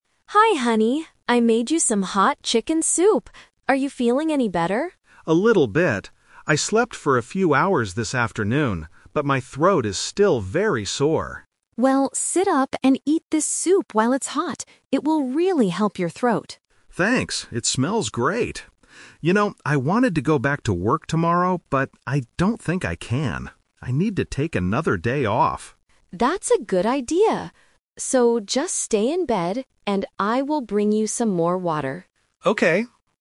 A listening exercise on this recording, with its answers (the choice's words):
Listen to a conversation between a husband and a wife. Choose the correct answer (A, B, or C) for each question.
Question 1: What did the man do this afternoon?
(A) He slept for a few hours.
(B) He cooked some chicken soup.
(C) He watched television in bed.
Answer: He slept for a few hours.

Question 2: How does the man feel right now?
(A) He feels completely better.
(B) His throat still hurts a lot.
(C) He has a terrible stomachache.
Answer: His throat still hurts a lot.

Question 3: What is the man's plan for tomorrow?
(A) He is going to go back to his office.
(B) He is going to visit the hospital.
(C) He is going to stay home from work.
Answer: He is going to stay home from work.

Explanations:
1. The husband says, "I slept for a few hours this afternoon."
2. The husband says, "my throat is still very sore." Sore means it hurts.
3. The husband says, "I need to take another day off." This means he will stay home from work again.

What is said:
Wife: Hi honey. I made you some hot chicken soup. Are you feeling any better?
Husband: A little bit. I slept for a few hours this afternoon, but my throat is still very sore.
Wife: Well, sit up and eat this soup while it's hot. It will really help your throat.
Husband: Thanks. It smells great. You know, I wanted to go back to work tomorrow, but I don't think I can. I need to take another day off.
Wife: That's a good idea. So, just stay in bed and I will bring you some more water.
Husband: Okay.